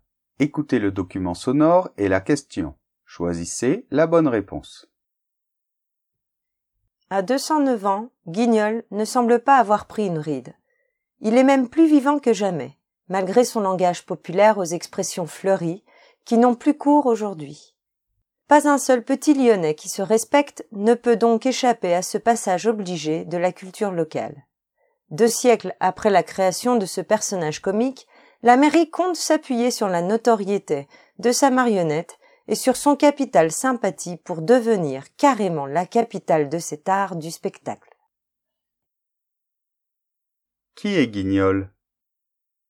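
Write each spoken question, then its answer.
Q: Qui est Guignol ?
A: Une marionnette, personnage comique lyonnais créé il y a deux siècles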